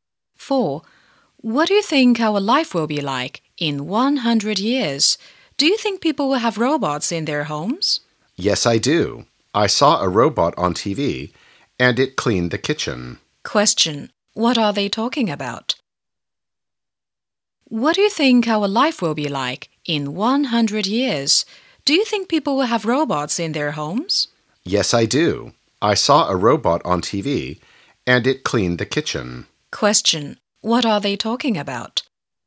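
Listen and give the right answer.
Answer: Robots in homes in the future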